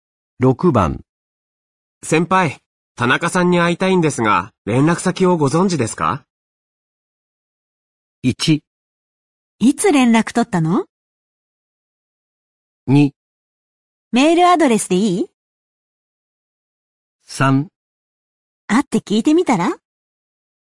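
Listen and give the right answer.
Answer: 2: メールアドレスでいい?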